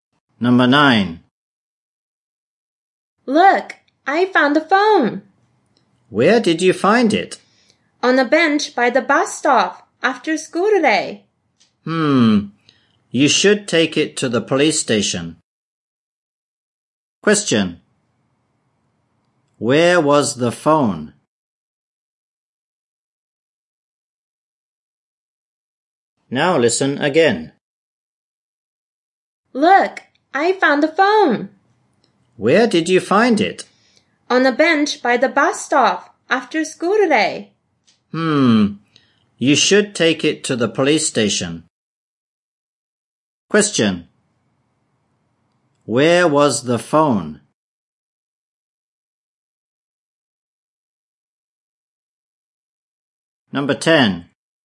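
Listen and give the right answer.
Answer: On a bench by the bus stop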